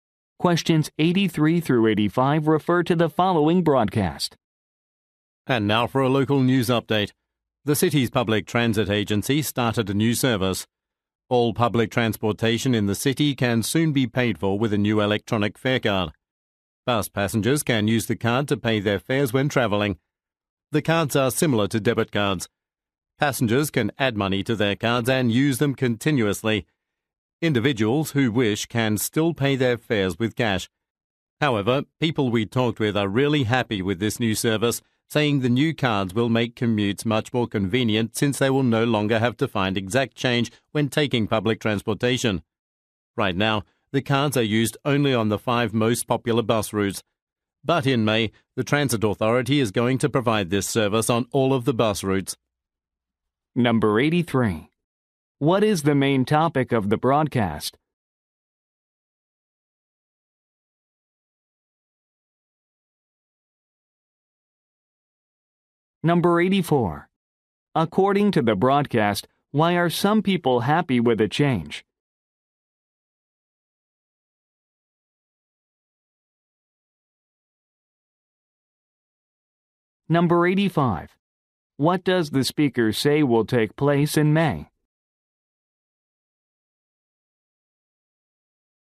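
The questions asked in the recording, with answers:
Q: What is the main topic of the broadcast?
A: A new electronic fare card for public transit

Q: According to the broadcast, why are some people happy with a change?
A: They no longer need exact change

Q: What does the speaker say will take place in May?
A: The cards will be usable on all bus routes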